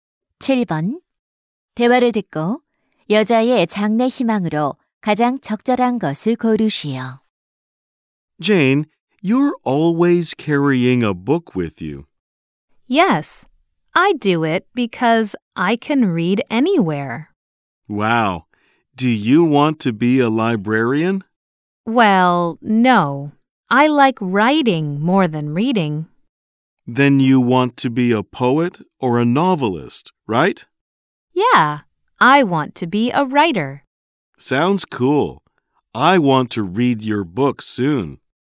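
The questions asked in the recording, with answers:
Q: 대화를 듣고 여자의 장래 희망으로 가장 적절한 것을 고르시오.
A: 작가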